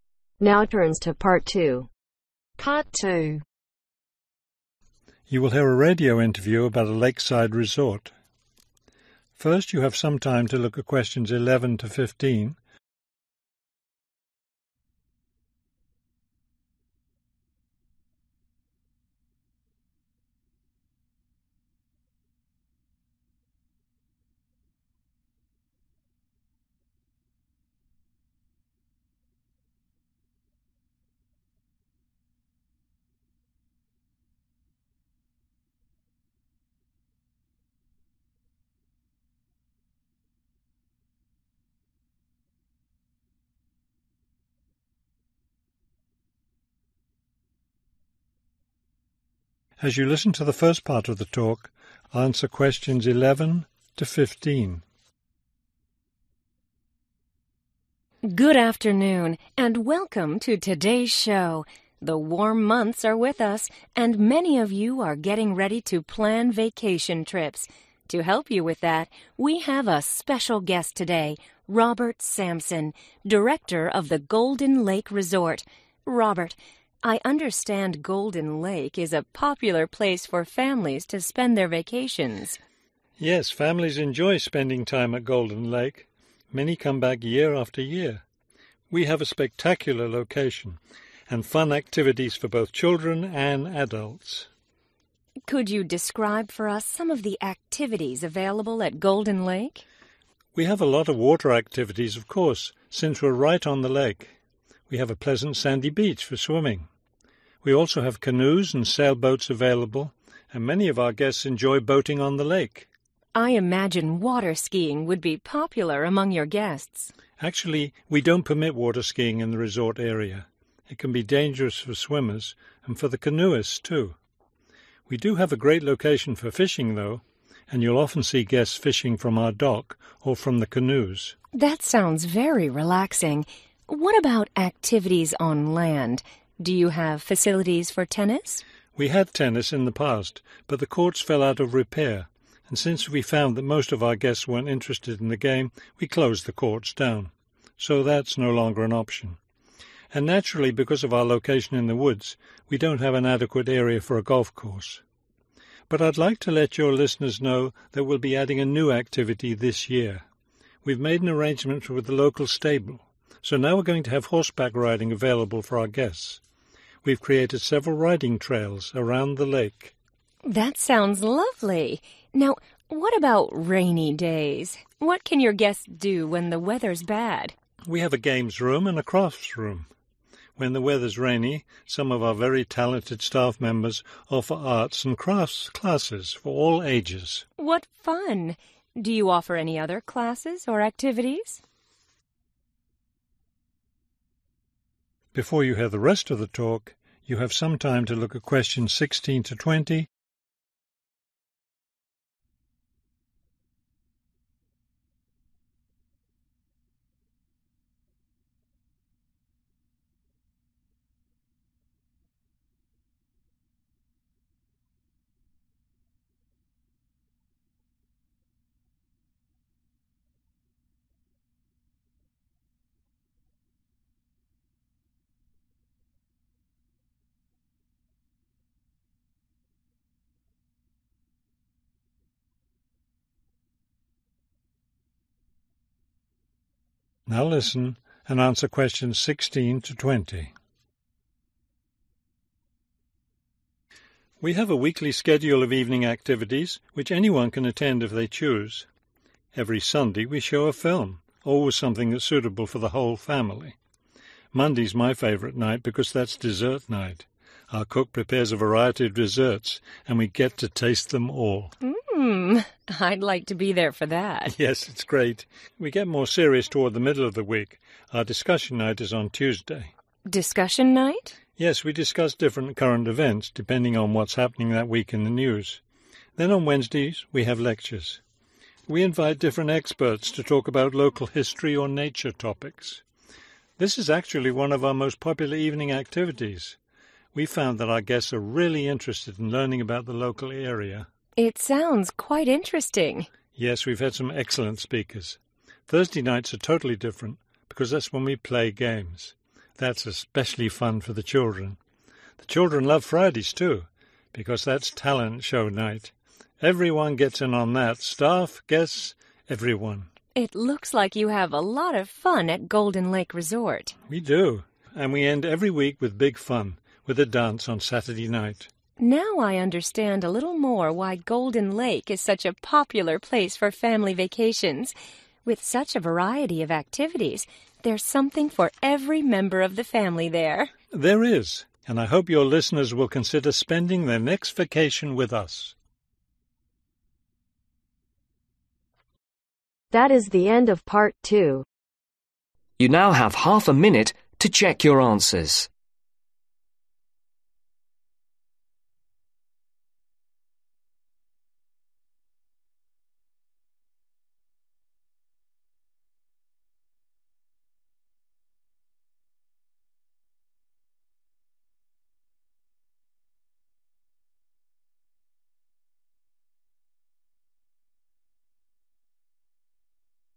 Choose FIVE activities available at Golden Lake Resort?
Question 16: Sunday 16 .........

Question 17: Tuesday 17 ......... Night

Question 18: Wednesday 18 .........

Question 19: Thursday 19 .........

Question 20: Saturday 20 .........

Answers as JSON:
{"16": "film/movie", "17": "discussion", "18": "lectures", "19": "games", "20": "dance"}